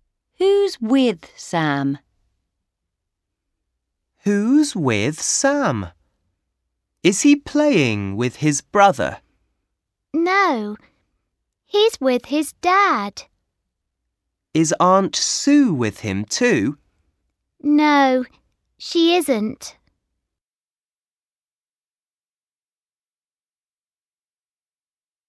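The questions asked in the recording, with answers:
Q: Who's with Sam?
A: His dad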